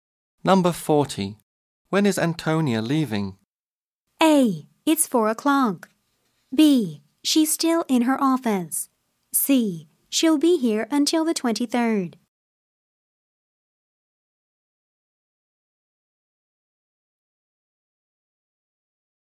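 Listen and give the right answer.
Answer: C: She'll be here until the 23rd.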